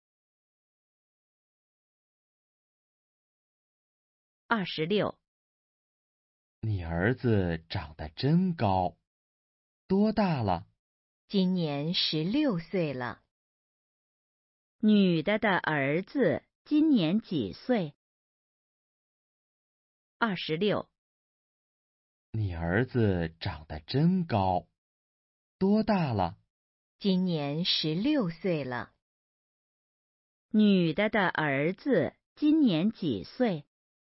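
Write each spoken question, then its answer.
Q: 女的的儿子今年几岁?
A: 16岁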